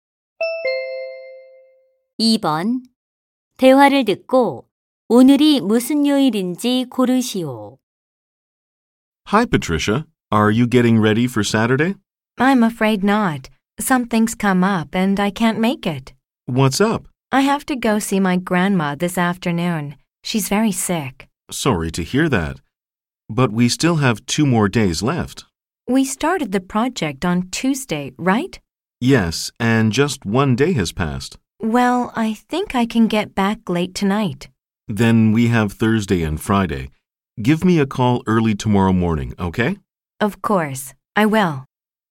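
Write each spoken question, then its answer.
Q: 대화를 듣고 오늘이 무슨 요일인지 고르시오.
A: 수요일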